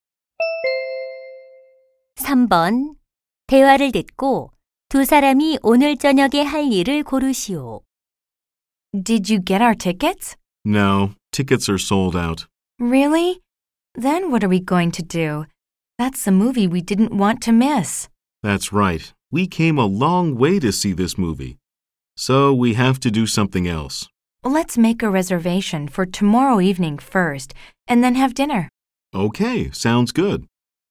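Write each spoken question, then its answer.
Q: 대화를 듣고 두 사람이 오늘 저녁에 할 일을 고르시오.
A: 내일 저녁 영화 예매 후 저녁 식사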